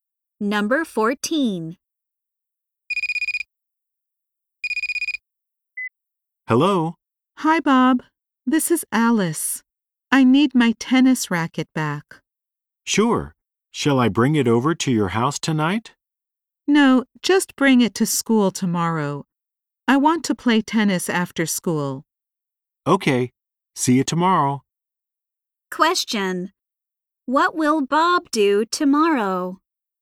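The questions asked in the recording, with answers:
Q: What will Bob do tomorrow?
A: Bring Alice's tennis racket to school.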